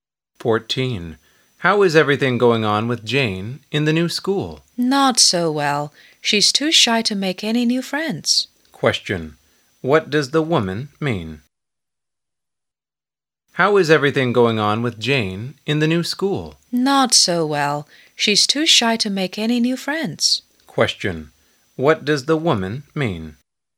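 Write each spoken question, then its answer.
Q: What does the woman mean?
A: Jane is too shy to make new friends at her new school.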